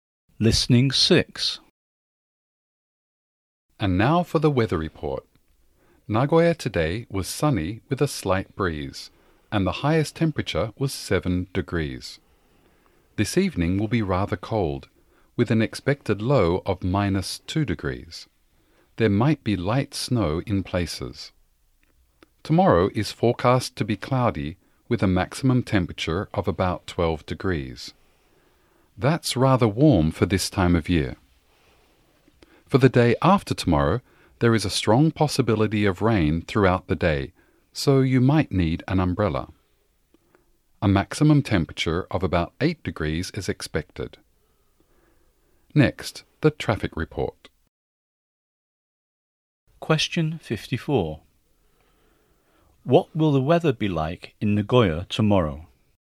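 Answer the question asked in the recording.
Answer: Cloudy, about 12 degrees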